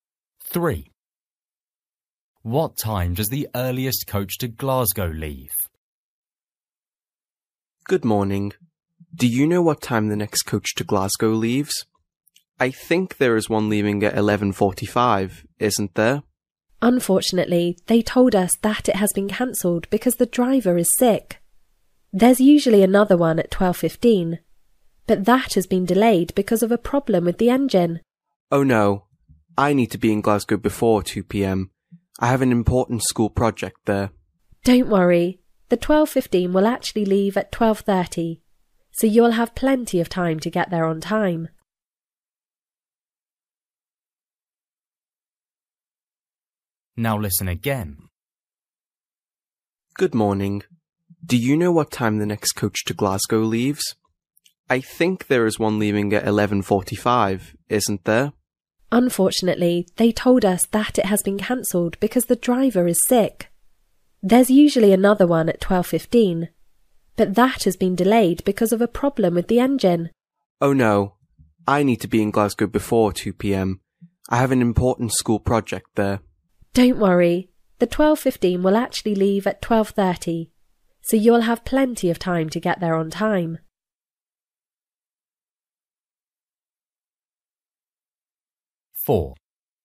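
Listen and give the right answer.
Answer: 12:30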